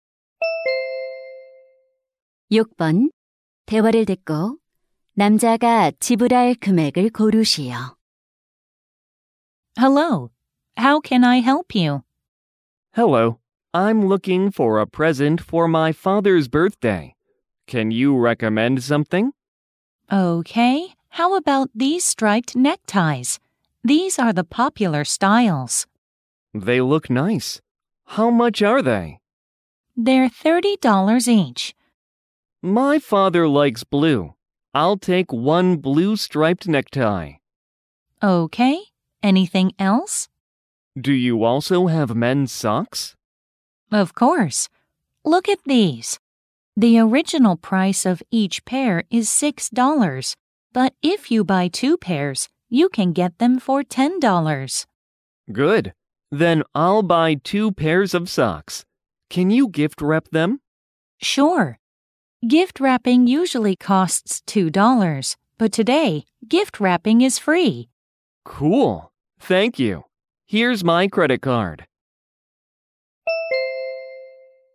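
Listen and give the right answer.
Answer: $40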